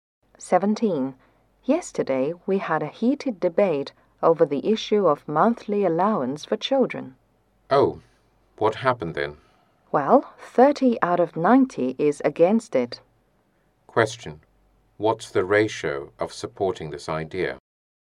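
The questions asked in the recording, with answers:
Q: What's the ratio of supporting this idea?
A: 60 out of 90 (two thirds)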